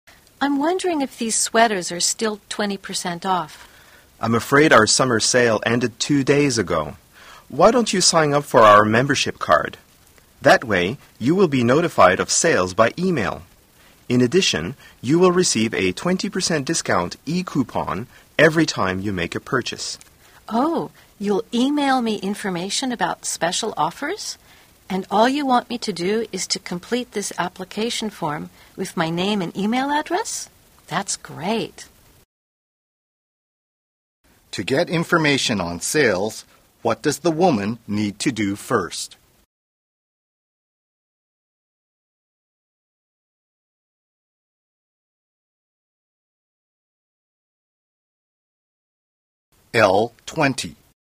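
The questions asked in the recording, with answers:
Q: To get information on sales, what does the woman need to do first?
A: Fill out the membership card application form with her name and email address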